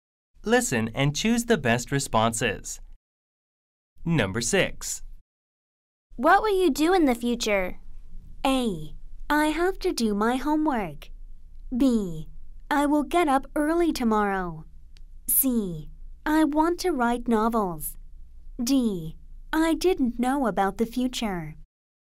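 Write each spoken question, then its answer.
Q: What will you do in the future?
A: C: I want to write novels.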